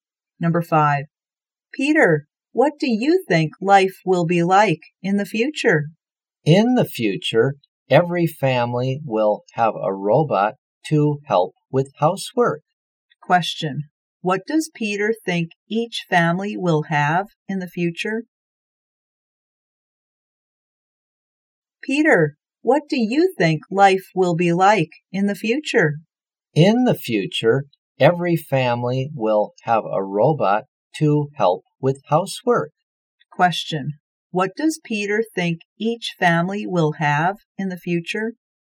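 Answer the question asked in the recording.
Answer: A robot to help with housework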